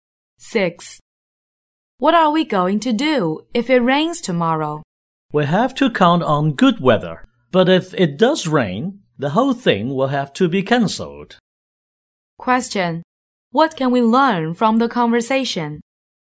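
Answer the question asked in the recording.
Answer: The event depends on the weather; it will be cancelled if it rains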